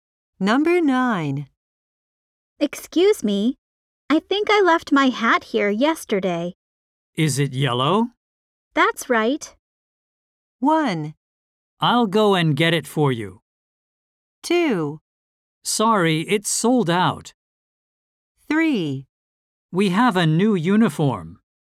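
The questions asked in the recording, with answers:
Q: That's right.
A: 1: I'll go and get it for you.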